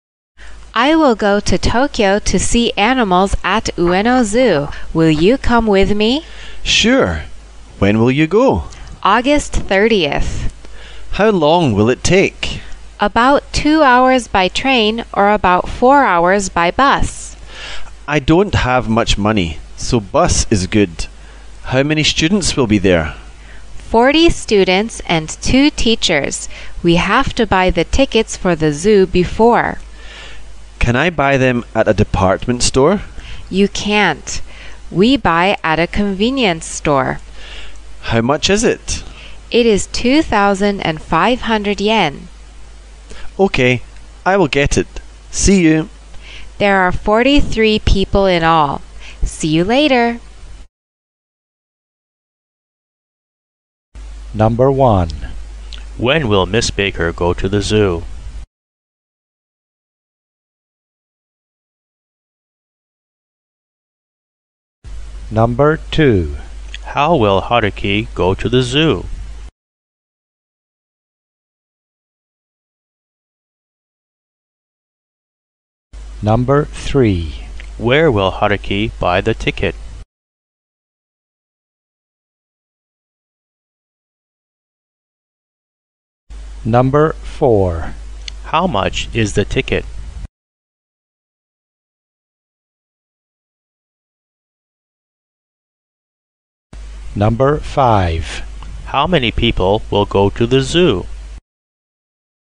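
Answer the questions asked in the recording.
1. August 30th
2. By bus
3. At a convenience store
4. 2,500 yen
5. 43 people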